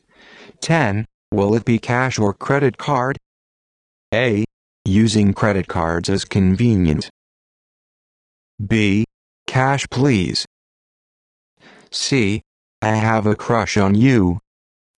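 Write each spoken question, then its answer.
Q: Will it be cash or credit card?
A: B: Cash, please.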